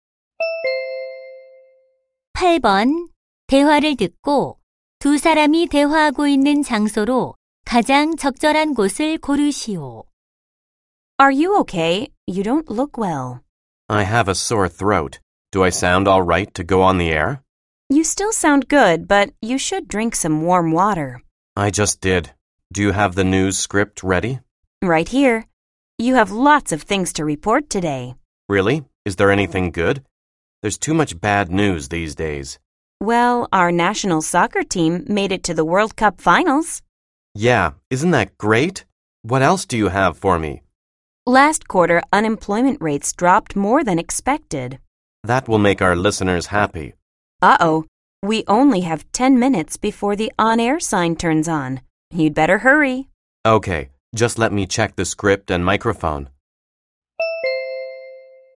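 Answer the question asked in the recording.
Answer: 라디오 방송국 (스튜디오)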